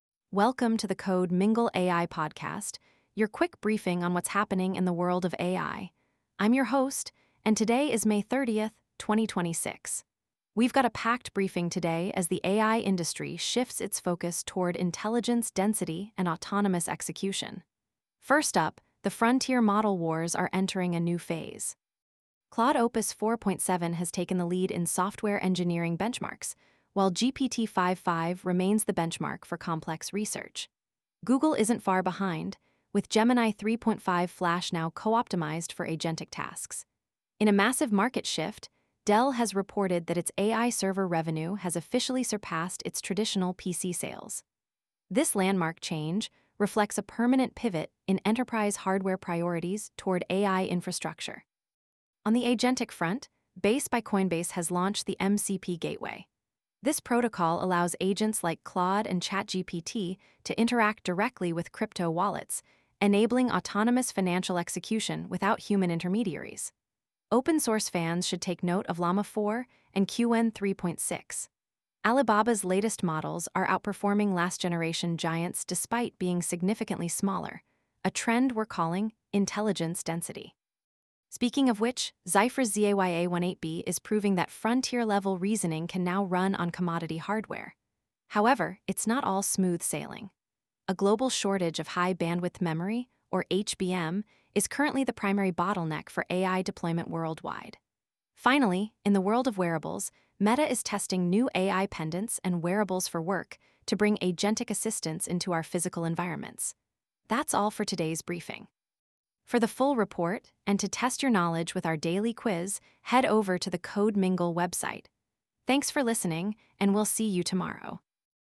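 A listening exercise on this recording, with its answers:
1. Which model currently leads in the SWE-bench for software engineering tasks as of late May 2026?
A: Claude Opus 4.7

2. What is the primary bottleneck currently affecting AI hardware deployment in 2026?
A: DRAM/HBM shortage

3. Which company's AI server revenue recently surpassed its traditional PC sales?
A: Dell

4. The MCP Gateway launched by Base allows AI agents to interact with what?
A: Crypto wallets

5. What is the term used to describe frontier-level reasoning achieved with smaller parameter counts?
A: Intelligence Density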